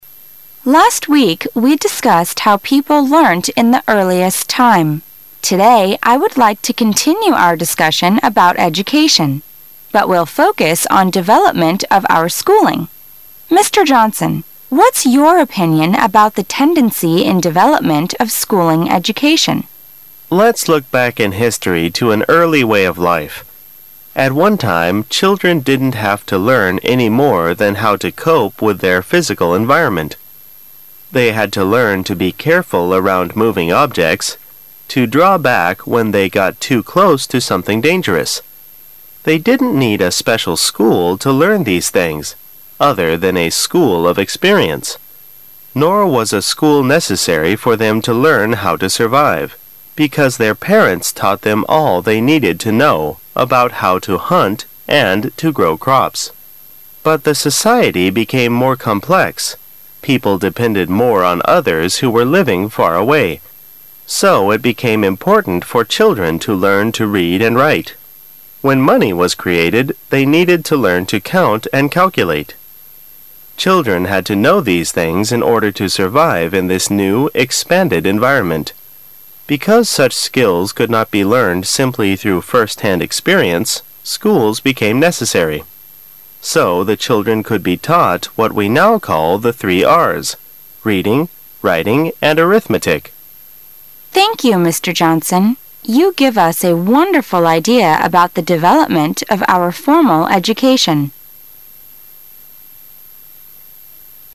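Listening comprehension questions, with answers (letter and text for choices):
Questions 18 - 21 are based on the following dialogue.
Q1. What did children need to learn how to do in the earliest time?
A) Count money.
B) Read and write.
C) Draw moving objects.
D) Hunt and farm.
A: D) Hunt and farm.

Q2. What is the main topic of today's discussion?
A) How people learnt in ancient time.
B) How parents educated their children.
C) Development of formal education.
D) Educational problems today.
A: C) Development of formal education.

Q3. Why was formal education in schools no! necessary for a long time?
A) Teachers came to children's homes.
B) Children acquired the information they needed by direct experience.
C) Children were taught in small groups.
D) Parents instructed their children at home.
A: B) Children acquired the information they needed by direct experience.

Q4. What changes in society first made it important to teach children the three R's?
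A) Dependence on people far away and the use of money.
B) The instruction of a new writing system.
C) Outdated methods of farming and ineffective means of transportation.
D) Larger family units and greater financial hardships.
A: A) Dependence on people far away and the use of money.

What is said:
[解析] 18-21 W: Last week; we discussed how people learnt in the earliest time. Today I would like to continue our discussion about education, but we'll focus on development of our schooling. Mr.Johnson, what's your opinion about the tendency in development of schooling education. M: Let's look back in history to an early way of life. At one time, children didn't have to learn any more than how to cope with their physical environment. They had to learn to be careful around moving objects, to draw back when they got too close to something dangerous. They didn't need a special school to learn these things other than a school of experience. 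Nor was a school necessary for them to learn how to survive ,because their parents taught them all they needed to know about how to hunt and to grow crops. But the society became more complex, people depended more on others who were living far away. So it became important for children to learn to read and write. When money was created, they needed to learn to count and calculate. Children had to know these things in order to survive in this new, expand ed environment. Because such skills could not be learned simply through first-hand experience, schools became necessary. So the children could be taught what we now called the three R's: reading, writing and arithmetic. W: Thank you Mr. Johnson. You give us a wonderful idea about the development of our formal education.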